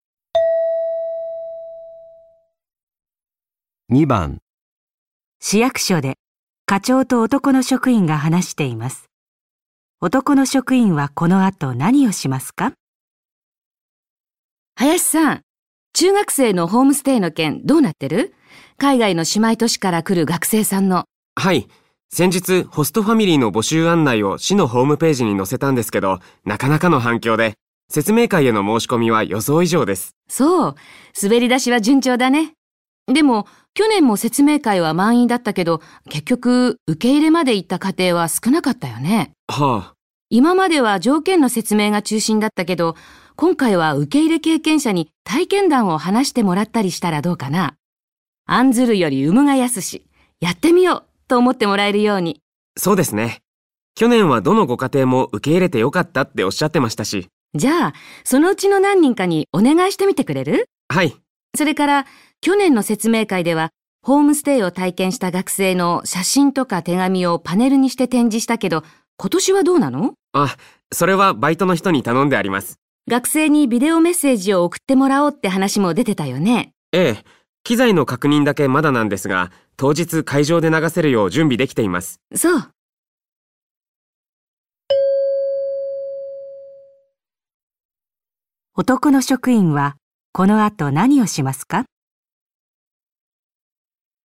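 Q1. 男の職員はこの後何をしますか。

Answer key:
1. 去年の受け入れ家庭の何人かに、説明会で体験談を話してもらうよう頼む

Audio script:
女:そう。滑り出しは順調だね。でも、去年も説明会は満員だったけど、結局受け入れまでいった家庭は少なかったよね。
男:はあ。
女:今までは条件の説明が中心だったけど、今回は受け入れ経験者に体験談を話してもらったりしたら、どうかなぁ。案ずるより産むが易し。やってみようと思ってもらえるように。
男:そうですね。去年はどのご家庭も受けいれてよかったっておしゃってましたし。
女:じゃ、そのうちの何人かにお願いしてみてくれる?
男:はい。
女:それから、去年の説明会ではホームステイを体験した学生の写真とか手紙をパネルにして展示したけど、今年はどうなの?
男:あ、それはバイトの人に頼んであります。
女:学生にビデオメッセージを送ってもらおうって話も出てたよね。
男:ええ、機材の確認だけまだなんですが、当日会場で流せるよう準備できています。

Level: N1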